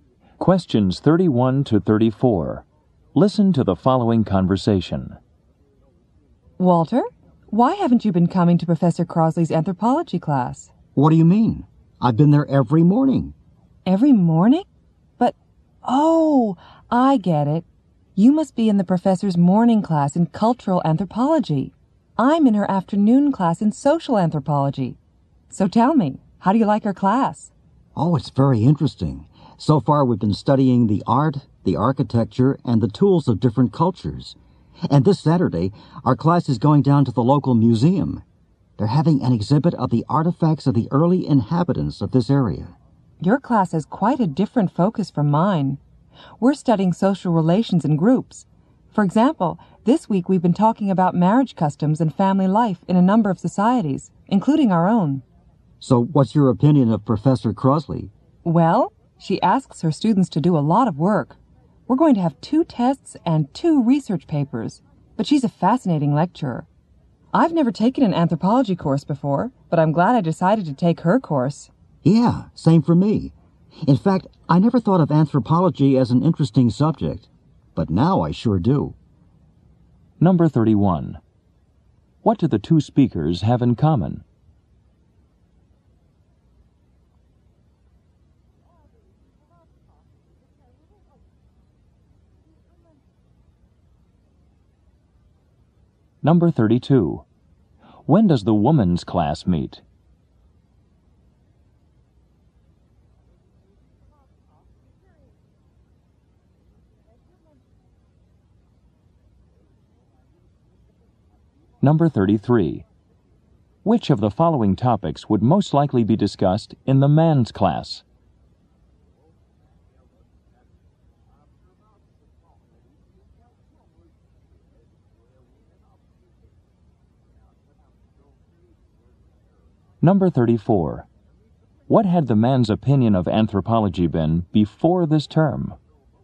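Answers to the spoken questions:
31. They both take Professor Crosley's anthropology class
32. In the afternoon
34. He didn't think it was an interesting subject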